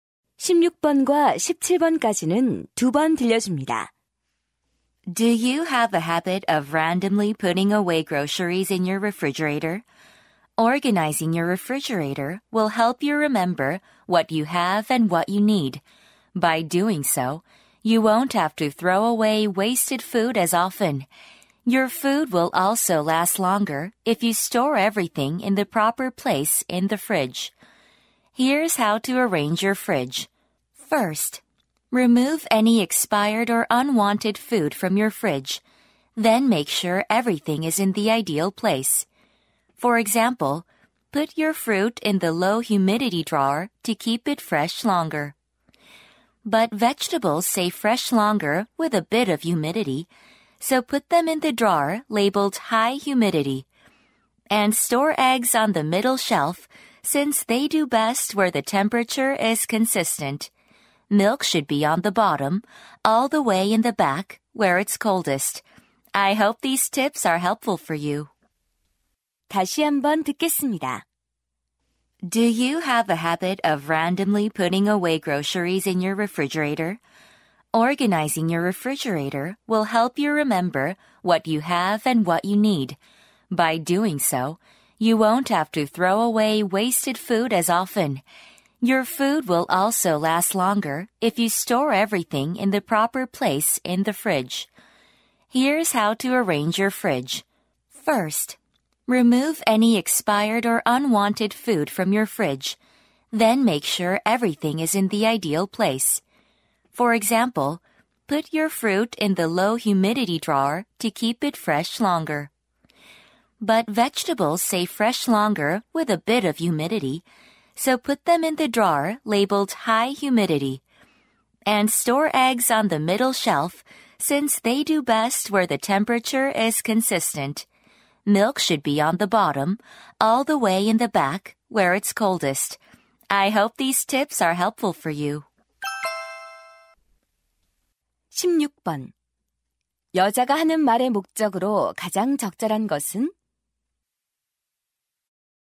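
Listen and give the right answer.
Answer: 냉장고 정리 방법을 알려 주려고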